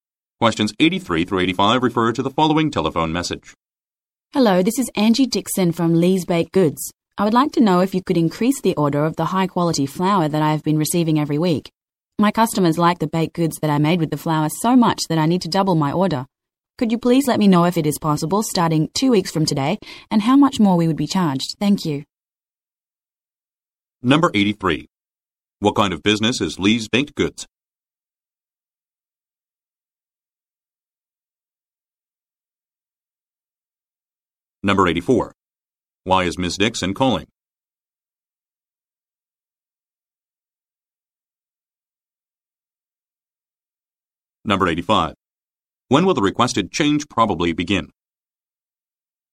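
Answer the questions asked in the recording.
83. A bakery
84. To increase her flour order
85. In 2 weeks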